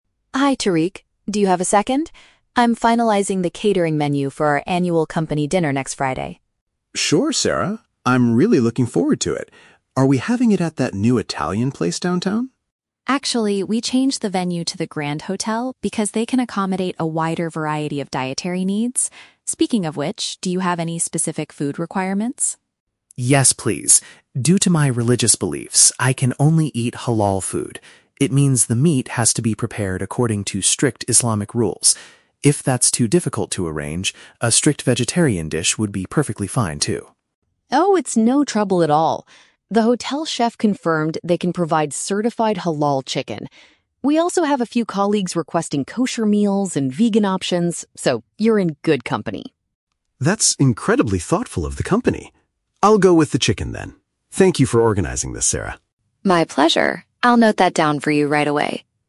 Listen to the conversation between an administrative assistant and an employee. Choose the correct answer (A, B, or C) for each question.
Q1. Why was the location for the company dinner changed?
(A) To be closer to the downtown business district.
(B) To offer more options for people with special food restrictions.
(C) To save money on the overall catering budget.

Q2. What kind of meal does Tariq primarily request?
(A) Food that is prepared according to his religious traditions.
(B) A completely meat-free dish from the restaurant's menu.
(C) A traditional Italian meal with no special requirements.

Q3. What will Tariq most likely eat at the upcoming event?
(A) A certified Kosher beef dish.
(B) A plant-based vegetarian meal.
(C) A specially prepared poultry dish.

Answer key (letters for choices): 1B, 2A, 3C

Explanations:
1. Sarah says they moved to the Grand Hotel because they can "accommodate a wider variety of dietary needs" (offer more options for food restrictions). Option (A) is a trap; Tariq asks if it's at the "Italian place downtown", but Sarah says they changed the venue. Option (C) is a logical reason for changing venues in real life, but it is never mentioned in the audio.
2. Tariq says, "Due to my religious beliefs, I can only eat Halal food" (food prepared according to religious traditions). Option (B) is a trap; he says a vegetarian dish is fine only if Halal meat is too difficult to arrange, but it is not his primary request. Option (C) is a trap; Italian food is mentioned as his guess for the venue, not his requested meal.
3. Sarah confirms the chef can provide "certified Halal chicken", and Tariq says "I'll go with the chicken" (a specially prepared poultry dish). Option (A) is a trap; Sarah mentions "Kosher meals" for other colleagues, not Tariq. Option (B) is a trap; Tariq offered to eat a vegetarian meal as a backup plan, but he ultimately chose the chicken.

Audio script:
Sarah: Hi Tariq, do you have a second? I'm finalizing the catering menu for our annual company dinner next Friday.
Tariq: Sure, Sarah. I'm really looking forward to it. Are we having it at that new Italian place downtown?
Sarah: Actually, we changed the venue to the Grand Hotel because they can accommodate a wider variety of dietary needs. Speaking of which, do you have any specific food requirements?
Tariq: Yes, please. Due to my religious beliefs, I can only eat Halal food. It means the meat has to be prepared according to strict Islamic rules. If that's too difficult to arrange, a strict vegetarian dish would be perfectly fine too.
Sarah: Oh, it's no trouble at all! The hotel chef confirmed they can provide certified Halal chicken. We also have a few colleagues requesting Kosher meals and vegan options, so you're in good company.
Tariq: That's incredibly thoughtful of the company. I'll go with the chicken, then. Thank you for organizing this, Sarah!